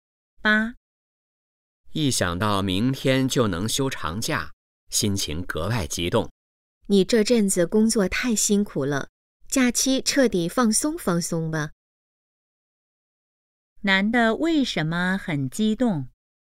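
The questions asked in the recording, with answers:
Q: 男的为什么很激动?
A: 明天就能休长假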